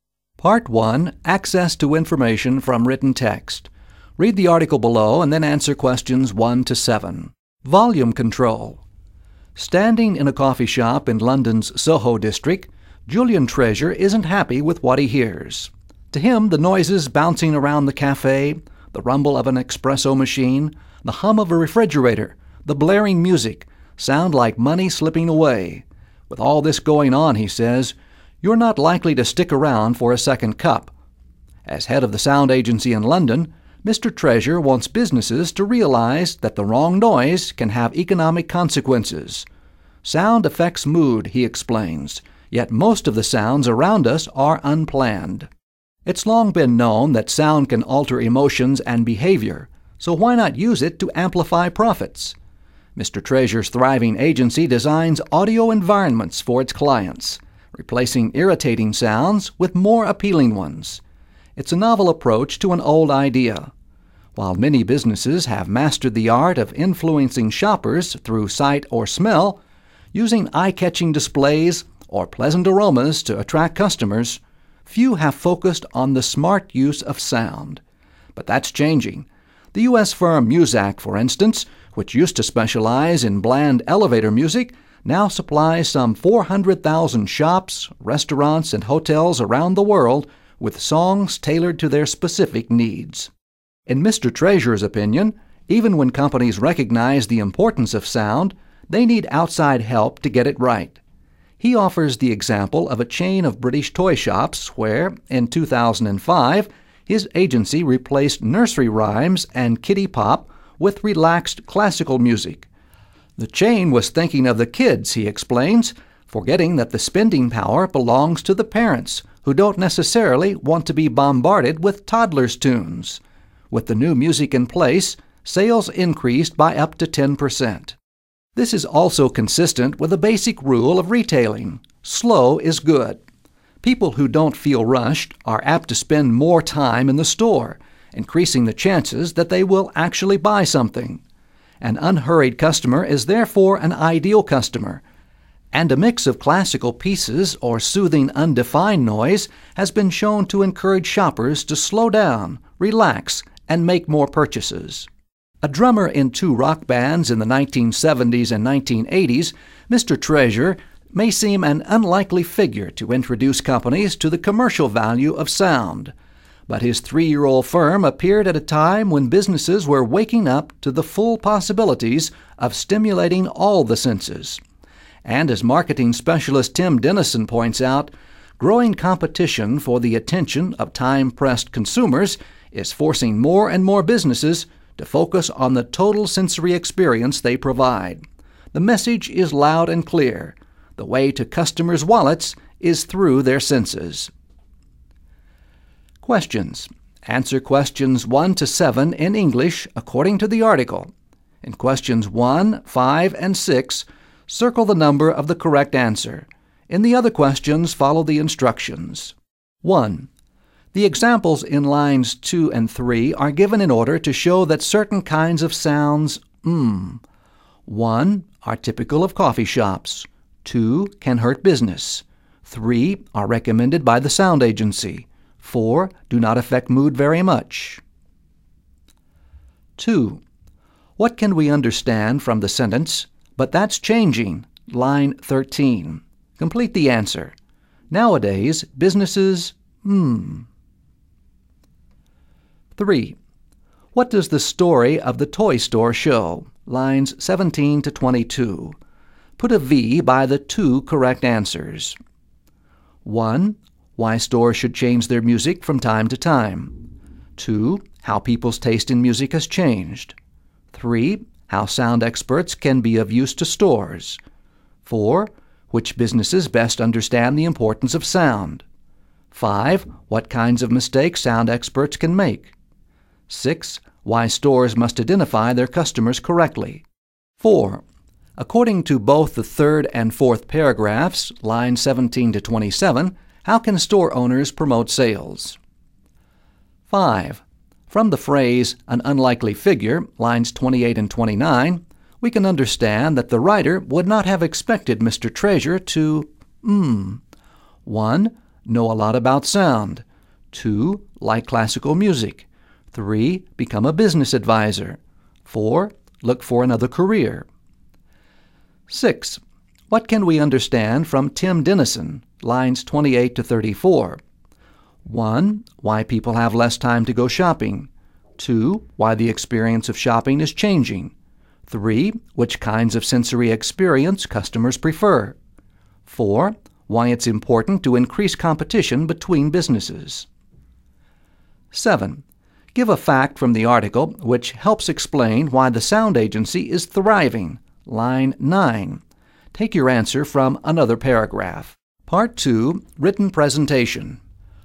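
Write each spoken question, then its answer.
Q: The examples in lines 2 and 3 are given in order to show that certain kinds of sounds, 1, are typical of coffee shops.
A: 2: can hurt business

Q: What can we understand from the sentence, but that's changing, line 13?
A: Nowadays, businesses are starting to focus on the smart use of sound.

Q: What does the story of the toy store show, lines 17 to 22?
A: 3: How sound experts can be of use to stores; 6: Why stores must identify their customers correctly

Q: According to both the third and fourth paragraphs, lines 17 to 27, how can store owners promote sales?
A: By playing relaxing music, such as classical music, so customers slow down and buy more

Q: From the phrase, an unlikely figure, lines 28 and 29, we can understand that the writer would not have expected Mr.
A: 3: Become a business advisor

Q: What can we understand from Tim Dennison, lines 28 to 34?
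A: 2: Why the experience of shopping is changing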